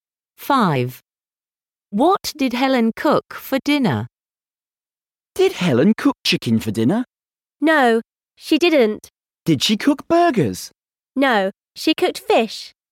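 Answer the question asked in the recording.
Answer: fish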